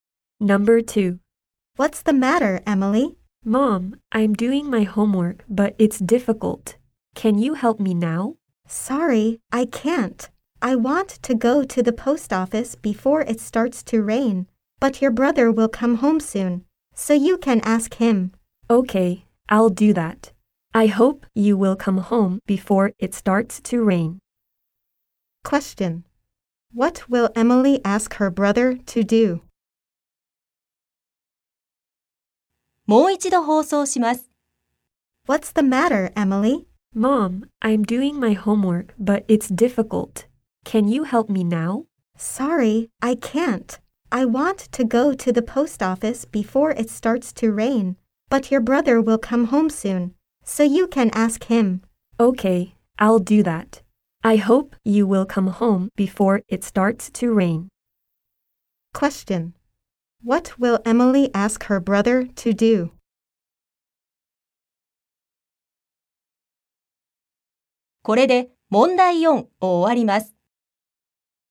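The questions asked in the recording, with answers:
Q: What will Emily ask her brother to do?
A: To help her with her homework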